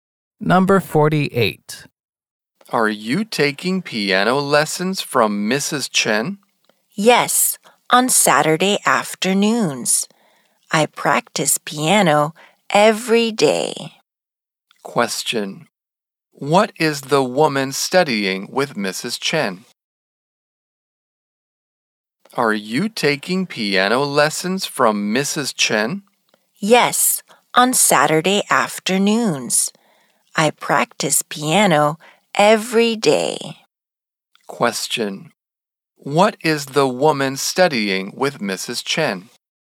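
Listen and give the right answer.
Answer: Piano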